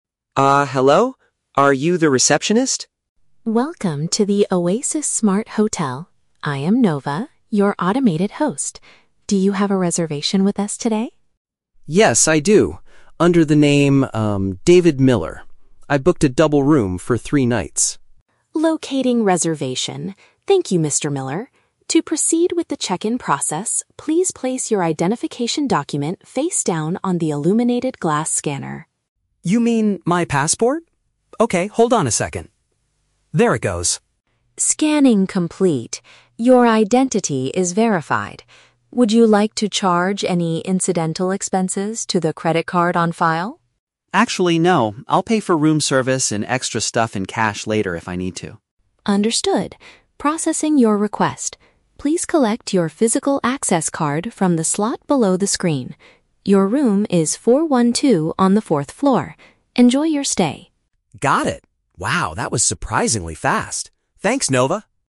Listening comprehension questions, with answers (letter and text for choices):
Listen to a conversation between a tourist and a robot receptionist, then choose the correct answer (A, B, or C) for each question.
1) What is the tourist required to do to confirm his identity?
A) Put his passport on the glowing machine.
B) Tell the robot his credit card number.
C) Look directly into the robot's camera.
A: A) Put his passport on the glowing machine.

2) How does the tourist plan to handle extra costs during his stay?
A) He will use the credit card he previously provided.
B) He intends to use physical money for them.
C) He wants to pay for everything using his smartphone.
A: B) He intends to use physical money for them.

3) Where does David get the item he needs to open his room?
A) From the illuminated glass area.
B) It is sent directly to his mobile device.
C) From an opening underneath the display.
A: C) From an opening underneath the display.

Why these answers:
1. The robot asks David to place his "identification document" (passport) on the "illuminated glass scanner" (glowing machine). Why the trap is wrong: Option (B) is the trap. The robot mentions a "credit card" later in the conversation for incidental expenses, not to confirm his identity. Option (C) is plausible for modern technology, but it is not mentioned.
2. David says he will pay for extra stuff "in cash" later. "Physical money" is a paraphrase of cash. Why the trap is wrong: Option (A) is the trap. The robot asks if he wants to use the "credit card on file" for expenses, but David explicitly rejects this idea by saying, "Actually, no." Option (C) is plausible but never mentioned in the audio.
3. The robot tells David to collect his "physical access card" (the item to open his room) from the "slot below the screen" (an opening underneath the display). Why the trap is wrong: Option (A) is the trap. The "illuminated glass" is the scanner where David put his passport, not where the room key comes out. Option (B) is a plausible smart hotel feature, but the robot gives him a physical card instead.

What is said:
David: Uh, hello? Are you the receptionist?
Robot: Welcome to the Oasis Smart Hotel. I am Nova, your automated host. Do you have a reservation with us today?
David: Yes, I do. Under the name, um, David Miller. I booked a double room for three nights.
Robot: Locating reservation. Thank you, Mr. Miller. To proceed with the check-in process, please place your identification document face down on the illuminated glass scanner.
David: You mean my passport? Okay, hold on a second... There it goes.
Robot: Scanning complete. Your identity is verified. Would you like to charge any incidental expenses to the credit card on file?
David: Actually, no. I'll pay for room service and extra stuff in cash later if I need to.
Robot: Understood. Processing your request. Please collect your physical access card from the slot below the screen. Your room is 412 on the fourth floor. Enjoy your stay.
David: Got it. Wow, that was surprisingly fast. Thanks, Nova!